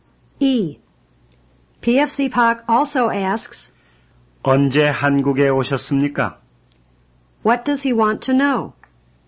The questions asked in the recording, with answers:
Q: What does he want to know?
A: He wants to know when you came to Korea.